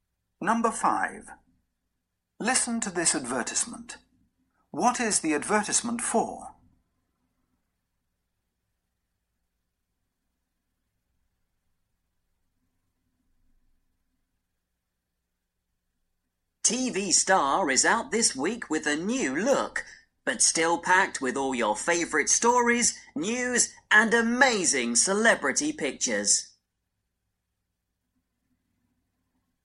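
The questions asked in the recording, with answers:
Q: What is the advertisement for?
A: A magazine (TV Star)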